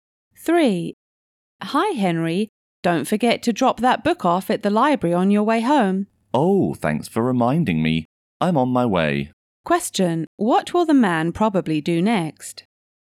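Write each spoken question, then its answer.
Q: What will the man probably do next?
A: Take the book back to the library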